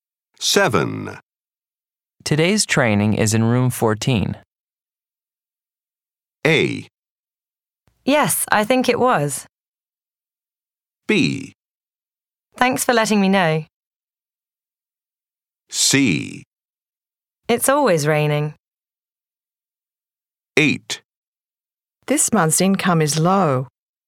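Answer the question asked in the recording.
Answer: B: Thanks for letting me know.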